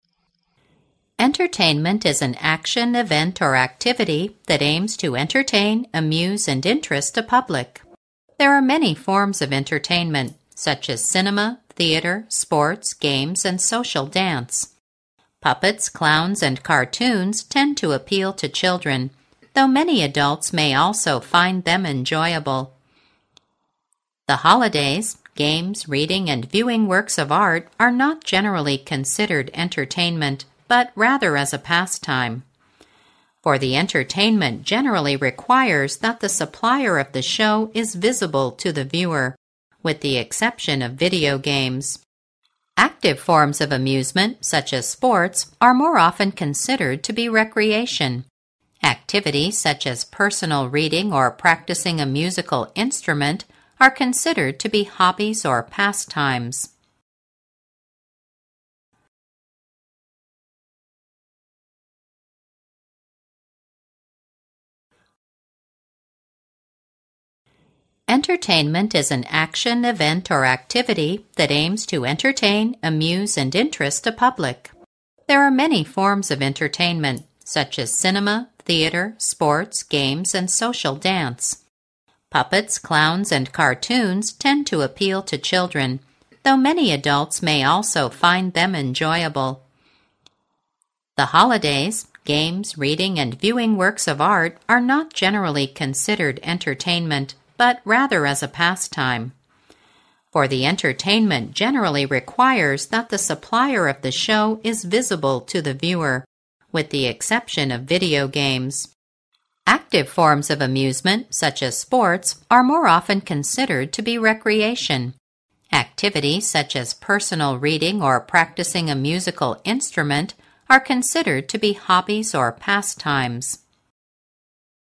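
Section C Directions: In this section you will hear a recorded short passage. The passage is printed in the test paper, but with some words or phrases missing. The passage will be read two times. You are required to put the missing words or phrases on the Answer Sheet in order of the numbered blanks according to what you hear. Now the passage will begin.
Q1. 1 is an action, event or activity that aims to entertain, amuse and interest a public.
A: Entertainment

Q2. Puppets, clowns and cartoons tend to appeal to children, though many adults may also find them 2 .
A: enjoyable

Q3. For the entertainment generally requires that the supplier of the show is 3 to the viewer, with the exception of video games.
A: visible

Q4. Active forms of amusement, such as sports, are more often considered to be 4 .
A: recreation

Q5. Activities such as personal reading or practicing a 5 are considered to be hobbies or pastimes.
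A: musical instrument

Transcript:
[听力原文] Entertainment is an action, event or activity that aims to entertain, amuse and interest a public. There are many forms of entertainment such as cinema, theater, sports, games and social dance. Puppets, clowns and cartoons tend to appeal to children, though many adults may also find them enjoyable. The holidays, games, reading and viewing works of art are not generally considered entertainment, but rather as a pastime. For the entertainment generally requires that the supplier of the show is visible to the viewer, with the exception of video games. Active forms of amusement, such as sports, are more often considered to be recreation. Activities such as personal reading or practicing a musical instrument are considered to be hobbies or pastimes.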